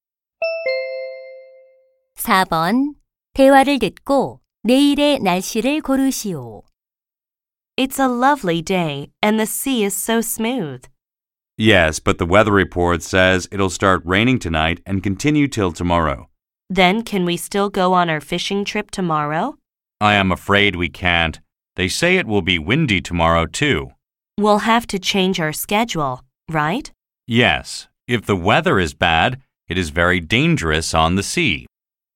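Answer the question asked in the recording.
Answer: 비가 오고 바람이 붊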